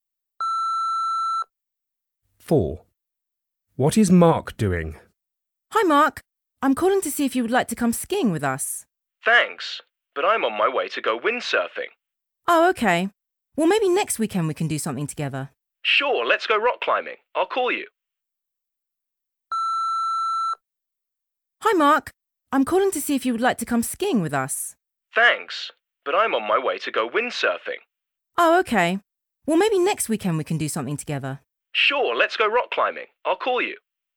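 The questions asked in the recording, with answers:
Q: What is Mark doing?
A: Going windsurfing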